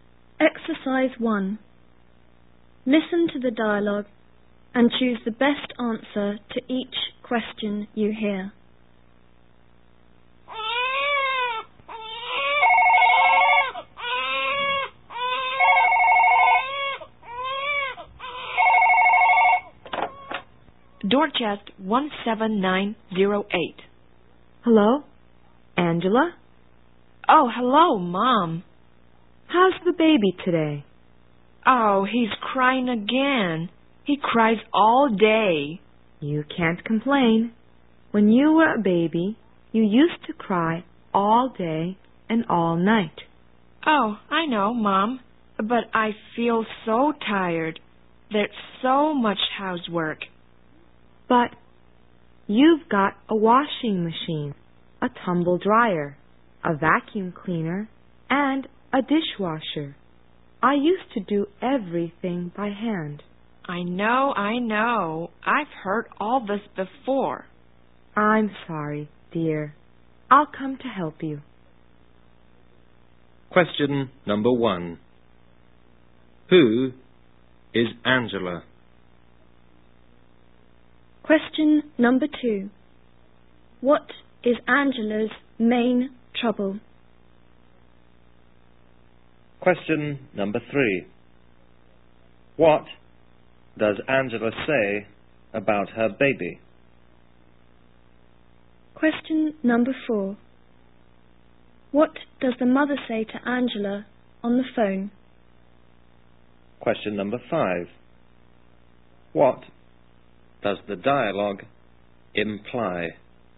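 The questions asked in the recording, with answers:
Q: Who is Angela?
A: The woman's daughter, a young mother with a baby

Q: What does Angela say about her baby?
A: He cries all day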